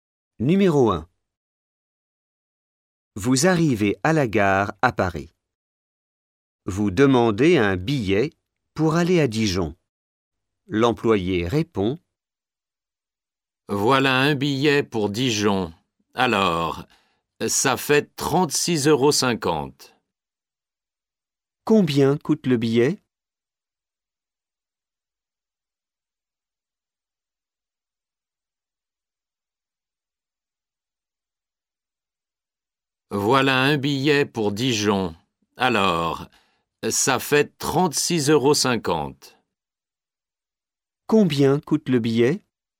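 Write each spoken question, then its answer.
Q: Combien coûte le billet ?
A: 36,50 €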